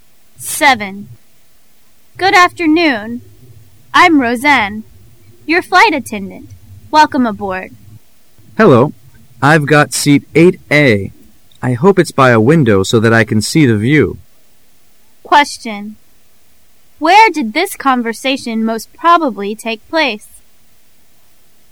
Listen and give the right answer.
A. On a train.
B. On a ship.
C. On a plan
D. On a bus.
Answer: C. On a plan